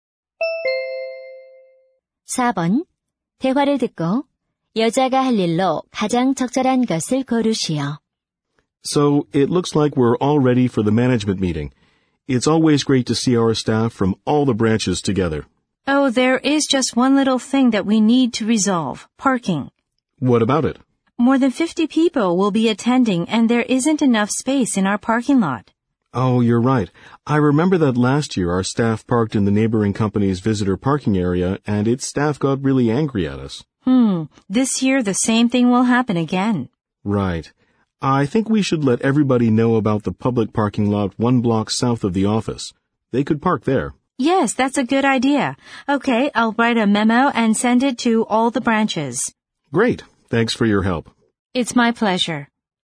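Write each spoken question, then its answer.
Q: 대화를 듣고 여자가 할 일로 가장 적절한 것을 고르시오.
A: 모든 지점에 메모 작성해서 보내기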